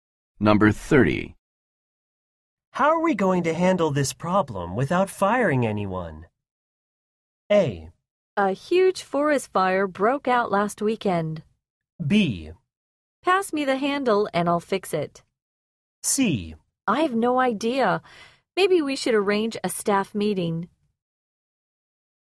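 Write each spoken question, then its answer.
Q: How are we going to handle this problem without firing anyone?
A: C: I have no idea. Maybe we should arrange a staff meeting.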